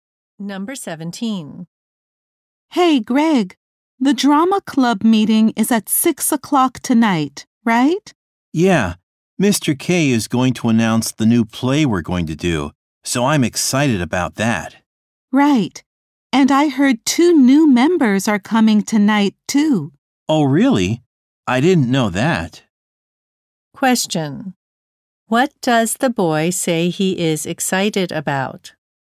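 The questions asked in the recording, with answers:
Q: What does the boy say he is excited about?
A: The announcement of the club's new play.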